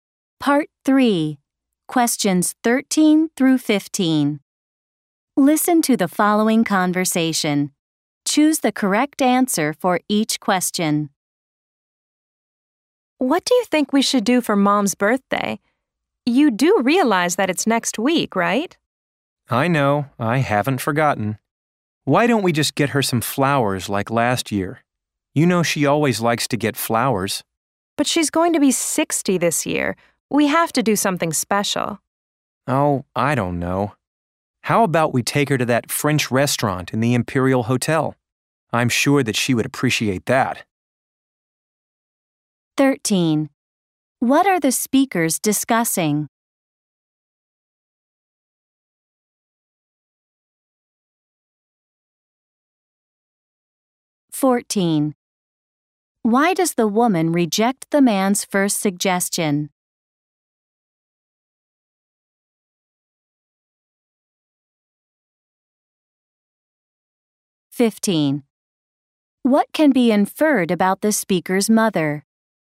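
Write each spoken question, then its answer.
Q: What are the speakers discussing?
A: What to do for their mom's birthday

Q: Why does the woman reject the man's first suggestion?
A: Their mom is turning 60, so they should do something special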